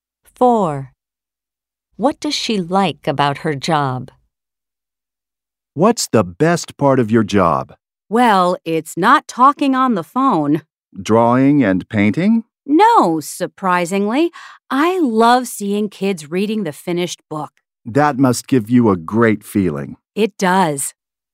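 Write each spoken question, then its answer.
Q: What does she like about her job?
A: Seeing kids reading the finished book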